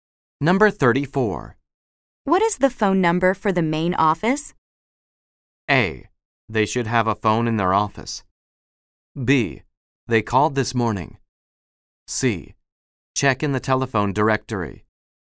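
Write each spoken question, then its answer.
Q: What is the phone number for the main office?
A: C: Check in the telephone directory.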